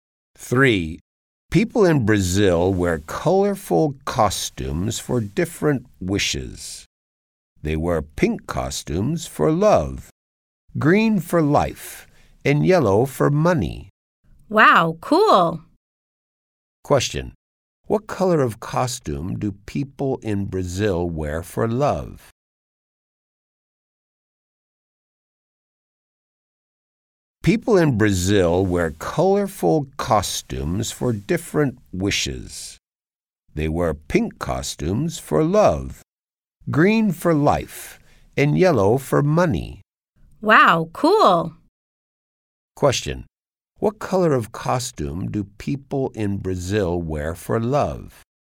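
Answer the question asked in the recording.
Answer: Pink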